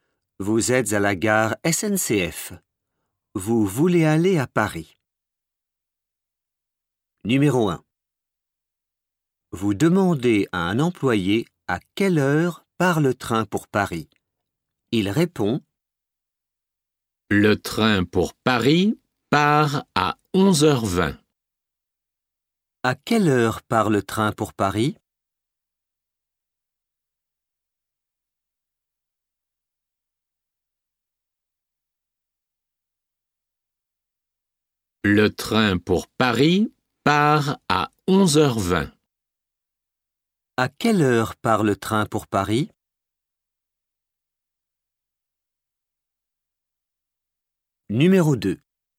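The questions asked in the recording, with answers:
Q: À quelle heure part le train pour Paris?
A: À 11h20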